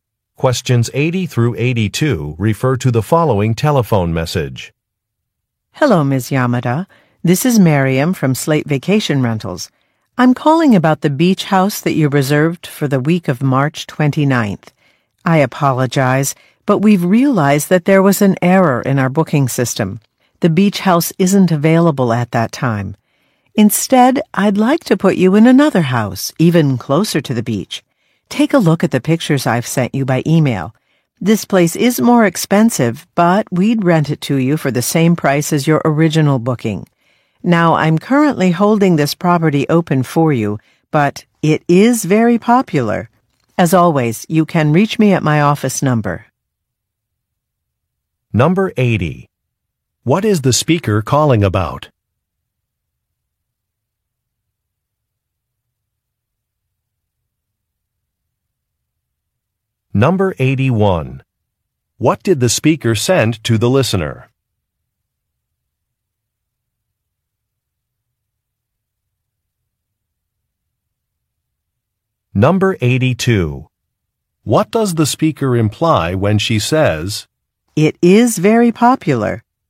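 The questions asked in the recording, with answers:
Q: What is the speaker calling about?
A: A problem with her beach house reservation

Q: What did the speaker send to the listener?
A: Pictures of another house

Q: What does the speaker imply when she says,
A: The listener should decide quickly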